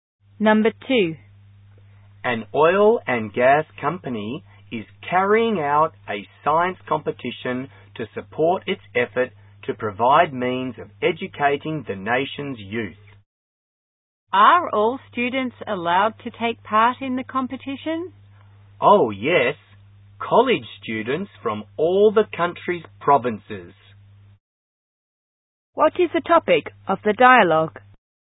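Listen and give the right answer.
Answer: A science competition for college students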